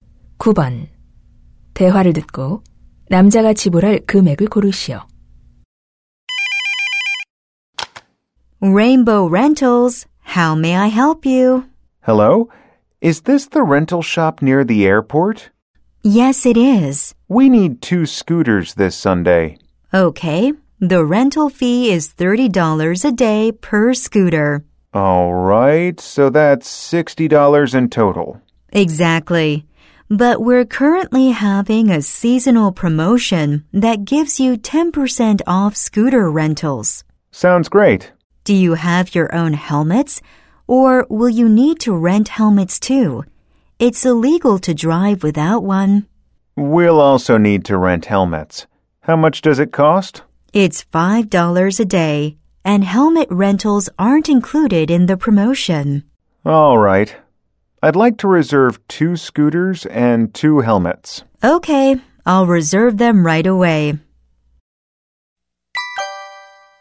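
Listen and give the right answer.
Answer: $64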